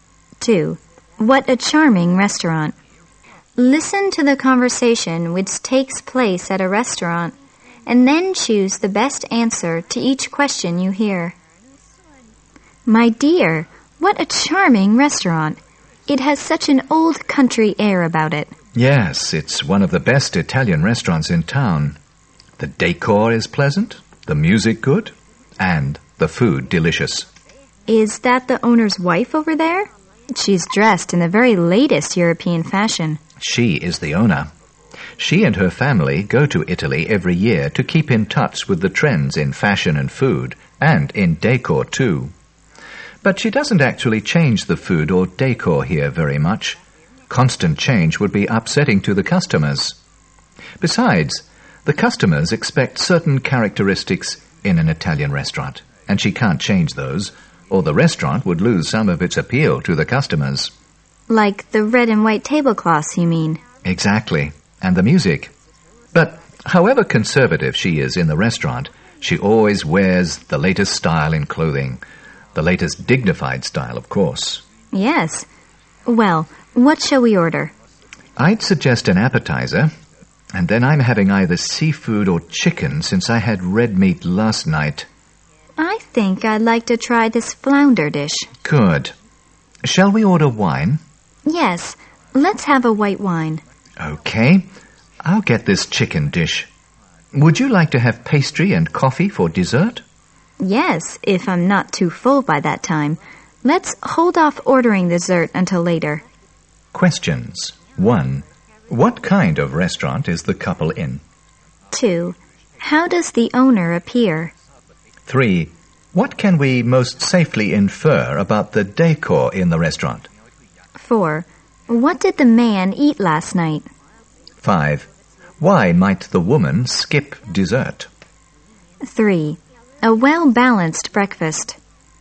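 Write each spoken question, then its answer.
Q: What kind of restaurant is the couple in?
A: An Italian restaurant

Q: How does the owner appear?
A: She is dressed in the latest European fashion

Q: What did the man eat last night?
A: Red meat

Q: Why might the woman skip dessert?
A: She might be too full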